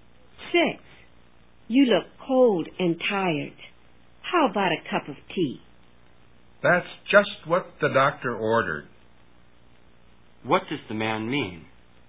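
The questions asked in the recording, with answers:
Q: What does the man mean?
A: A cup of tea is exactly what he needs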